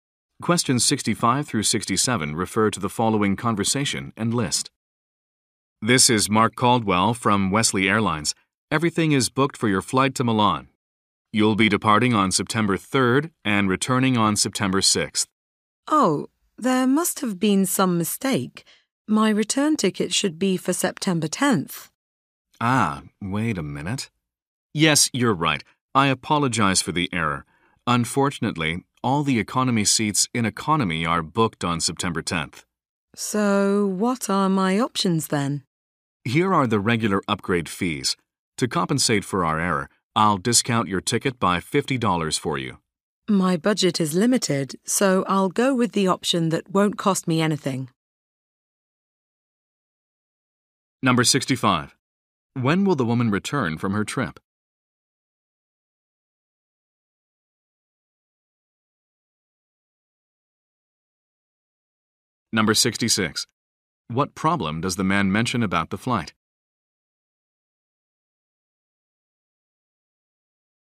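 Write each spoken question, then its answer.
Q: When will the woman return from her trip?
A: September 10th

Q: What problem does the man mention about the flight?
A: All the economy seats are booked on September 10th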